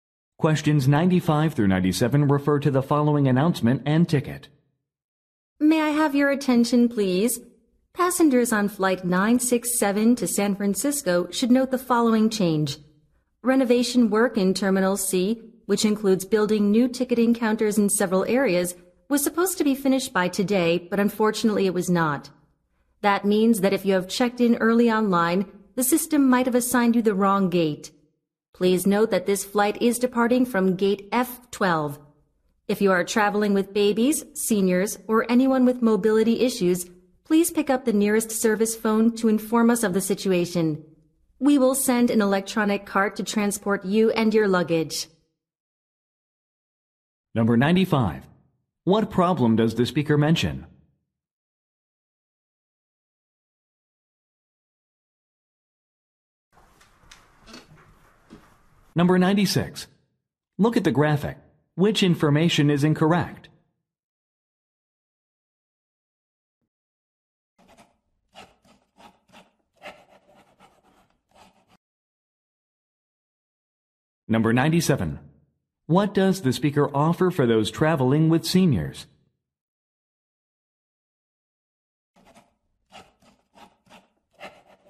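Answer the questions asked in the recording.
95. Renovation work was not finished
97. An electronic cart for transport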